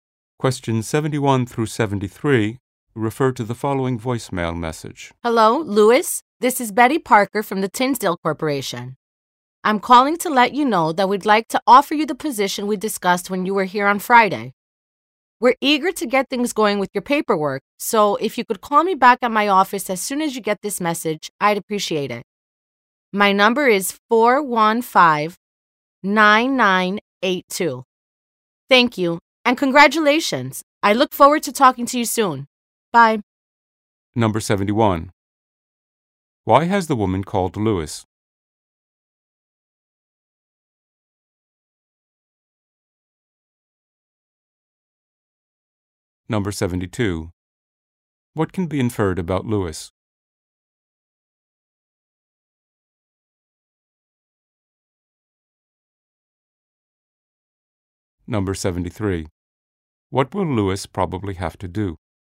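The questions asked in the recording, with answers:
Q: Why has the woman called Lewis?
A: To offer him a job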